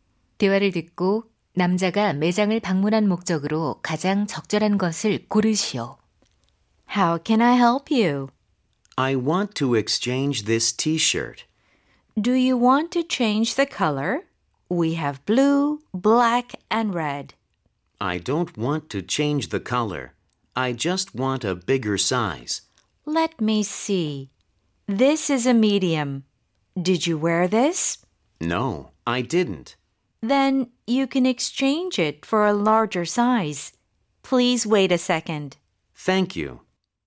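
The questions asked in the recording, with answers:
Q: 대화를 듣고 남자가 매장을 방문한 목적으로 가장 적절한 것을 고르시오.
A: 티셔츠를 더 큰 사이즈로 교환하려고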